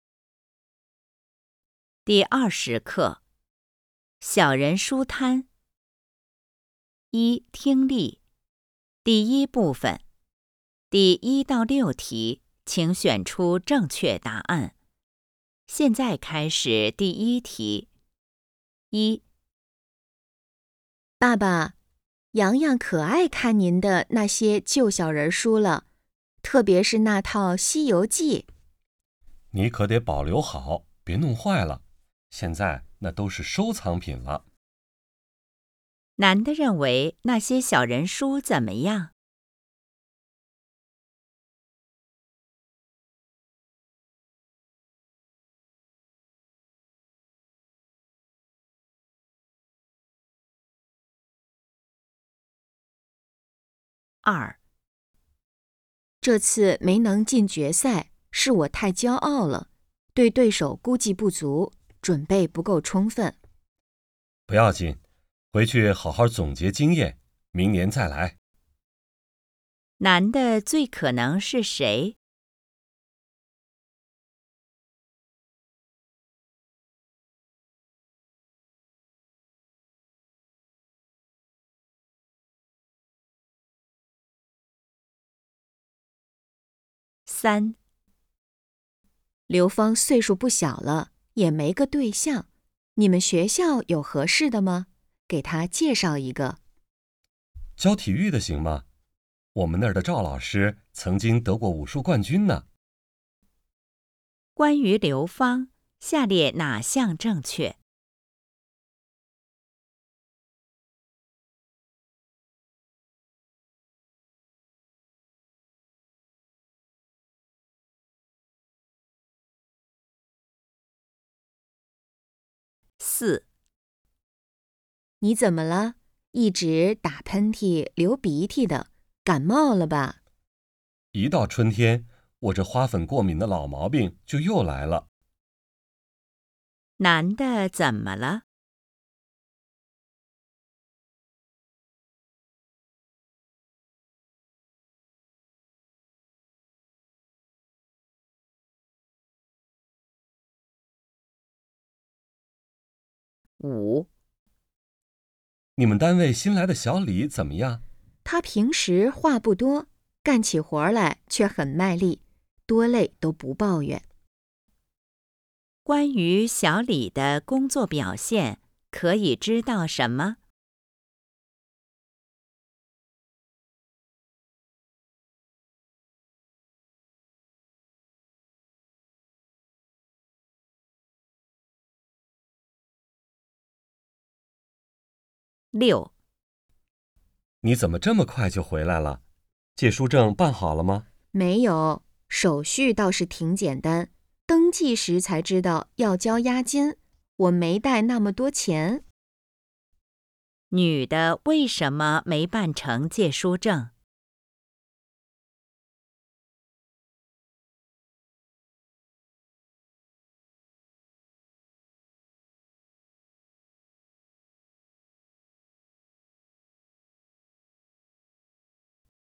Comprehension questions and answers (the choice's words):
第1-6题:请选择正确答案。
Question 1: 男的认为那些小人书怎么样?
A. 很有收藏价值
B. 内容过时陈旧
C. 不值得再保留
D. 《西游记》最好看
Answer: 很有收藏价值

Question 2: 男的最可能是谁?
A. 教练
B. 医生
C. 对手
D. 经理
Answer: 教练

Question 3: 关于刘芳,下列哪项正确?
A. 是武术冠军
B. 在学校工作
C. 很想当老师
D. 还没男朋友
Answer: 还没男朋友

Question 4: 男的怎么了?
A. 感冒了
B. 失眠了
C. 嗓子疼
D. 过敏了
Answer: 过敏了

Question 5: 关于小李的工作表现,可以知道什么?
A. 很善于思考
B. 做事爱抱怨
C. 工作很勤奋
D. 干活儿怕吃苦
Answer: 工作很勤奋

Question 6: 女的为什么没办成借书证?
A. 没带够押金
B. 办理的人多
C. 图书馆闭馆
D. 手续太复杂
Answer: 没带够押金

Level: HSK 5